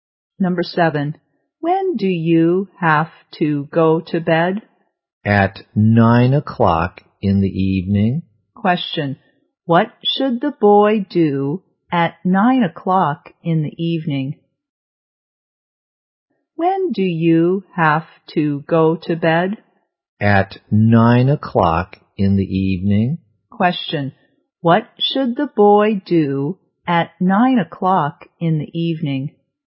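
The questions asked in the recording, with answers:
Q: what should the boy do at 9 o'clock in the evening?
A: Go to bed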